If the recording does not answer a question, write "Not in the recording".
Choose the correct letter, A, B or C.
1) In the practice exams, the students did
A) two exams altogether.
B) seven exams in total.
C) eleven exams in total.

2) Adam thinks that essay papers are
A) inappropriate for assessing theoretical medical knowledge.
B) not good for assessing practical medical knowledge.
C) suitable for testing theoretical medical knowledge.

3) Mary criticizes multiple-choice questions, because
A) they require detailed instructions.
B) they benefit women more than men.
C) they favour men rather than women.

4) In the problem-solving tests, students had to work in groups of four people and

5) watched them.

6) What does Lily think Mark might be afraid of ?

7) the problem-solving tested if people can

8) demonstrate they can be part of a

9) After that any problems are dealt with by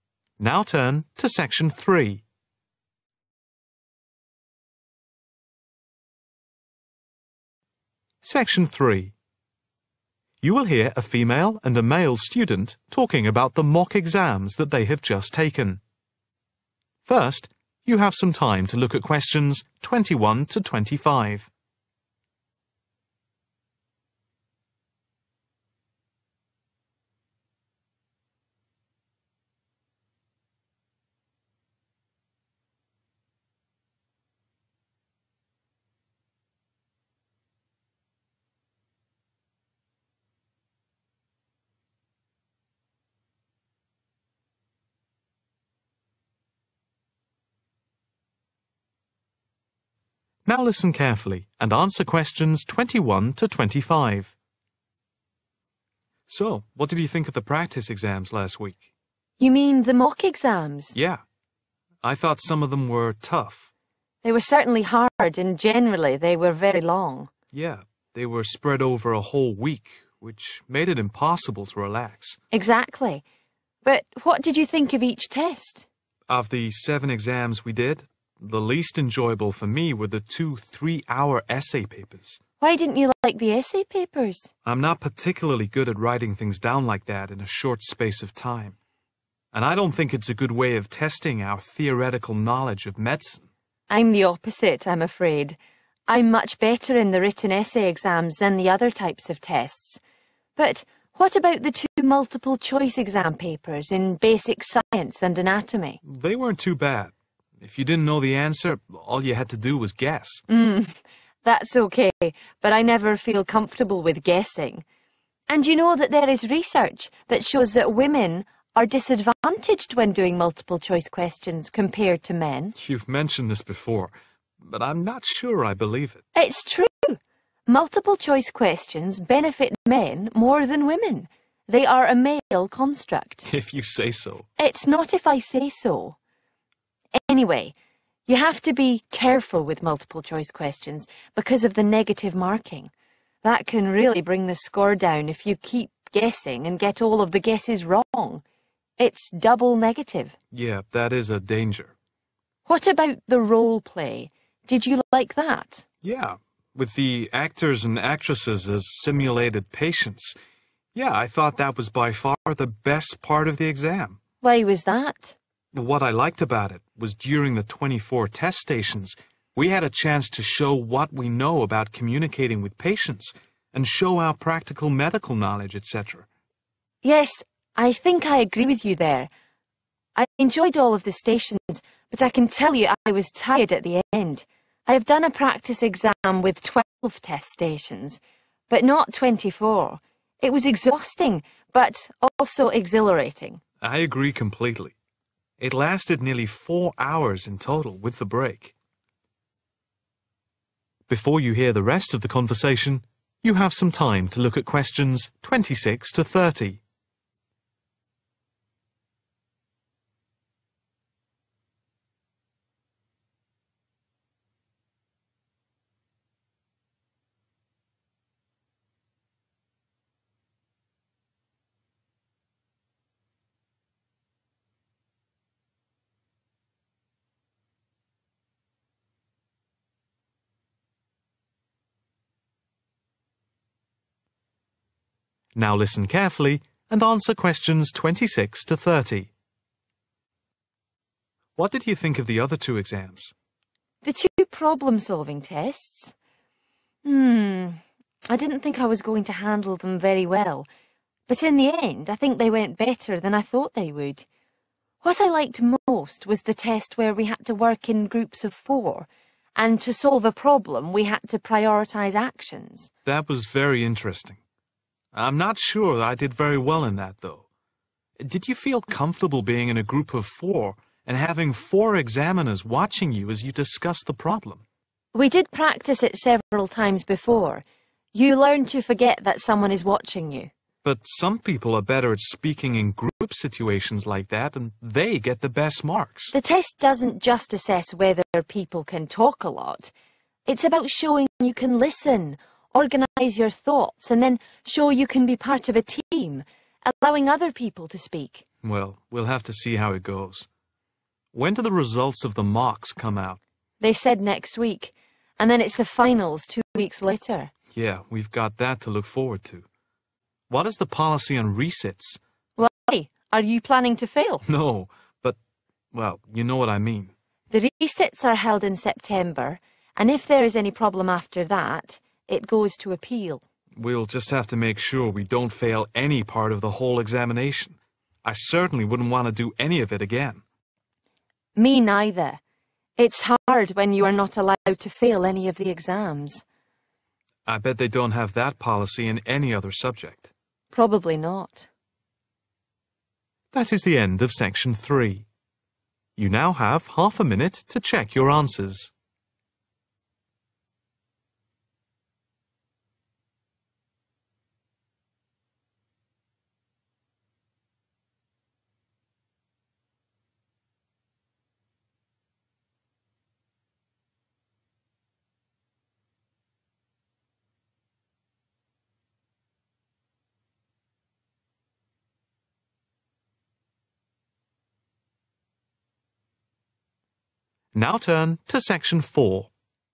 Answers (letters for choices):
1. B
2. A
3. C
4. prioritize/prioritise actions
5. four/4/four examiners
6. Not in the recording
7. listen
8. team
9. appeal